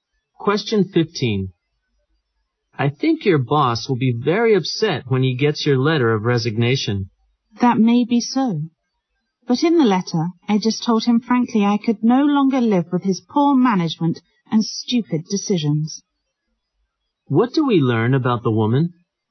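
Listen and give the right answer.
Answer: She resigned because she could no longer put up with her boss's poor management and stupid decisions.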